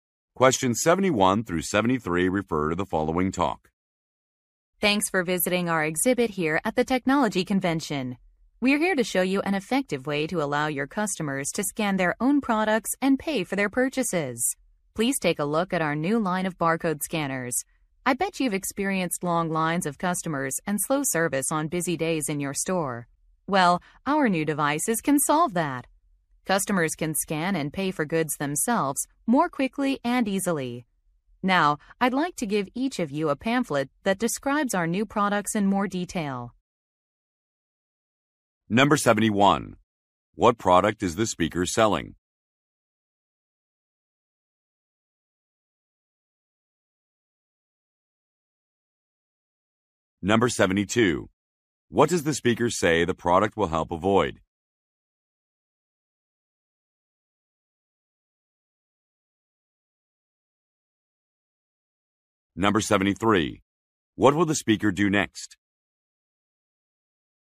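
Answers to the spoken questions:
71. Barcode scanners
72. Long lines and slow service
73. Hand out pamphlets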